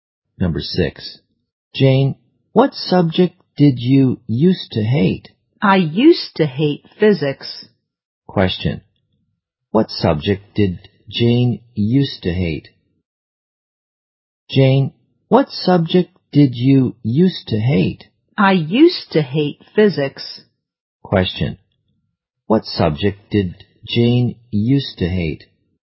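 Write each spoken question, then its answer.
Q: what subject did Jane used to hate?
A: Physics.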